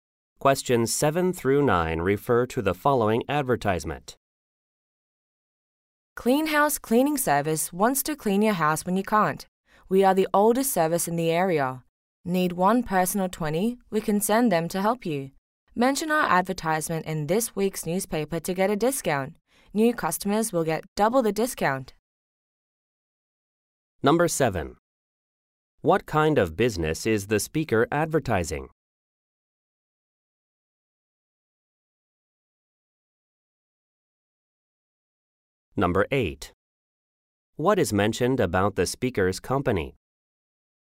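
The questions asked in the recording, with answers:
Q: What kind of business is the speaker advertising?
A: A house cleaning service.

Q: What is mentioned about the speaker's company?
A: It is the oldest service in the area.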